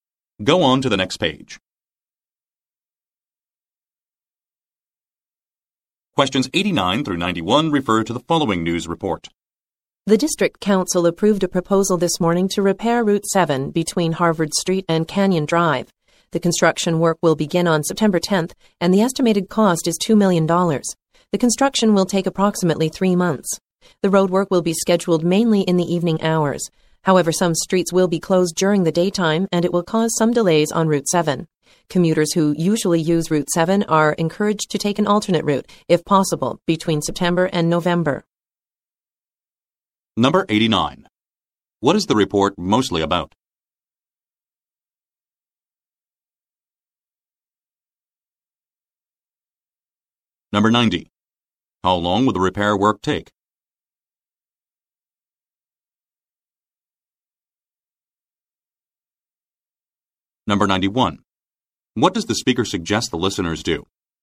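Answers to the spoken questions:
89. Repairs to Route 7
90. About 3 months
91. Take an alternate route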